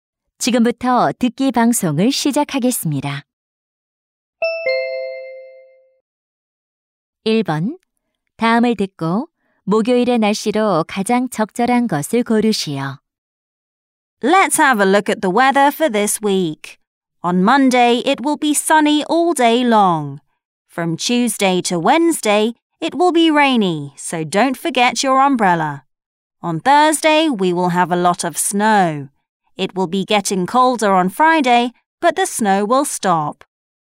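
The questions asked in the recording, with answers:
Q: 다음을 듣고 목요일의 날씨로 가장 적절한 것을 고르시오.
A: 눈이 많이 옴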